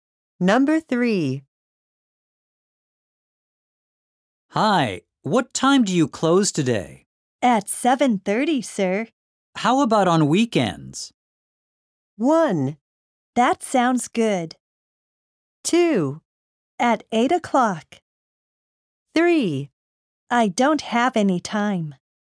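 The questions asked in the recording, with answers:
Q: How about on weekends?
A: 2: At 8 o'clock.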